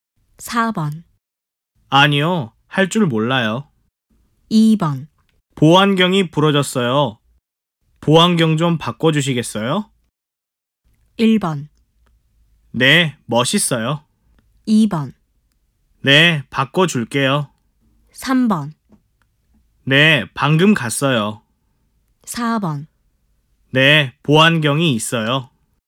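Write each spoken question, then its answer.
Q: 보안경이 부러졌어요. 보안경 좀 바꿔주시겠어요?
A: 2: 네, 바꿔줄게요.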